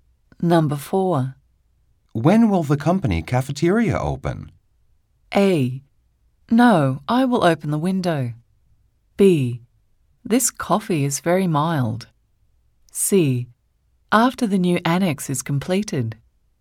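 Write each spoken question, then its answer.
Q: When will the company cafeteria open?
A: C: After the new annex is completed.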